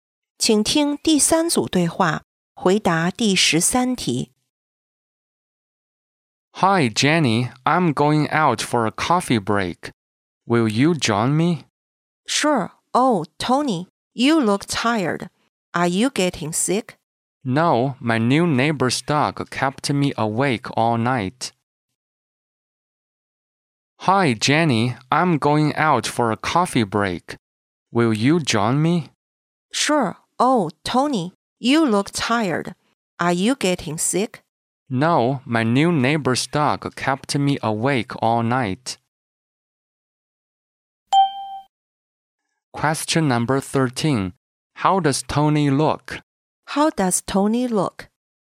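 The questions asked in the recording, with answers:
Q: How does Tony look?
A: Tired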